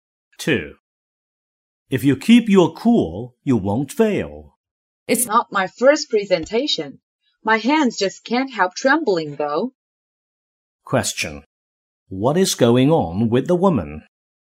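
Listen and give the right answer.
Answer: She is nervous about her presentation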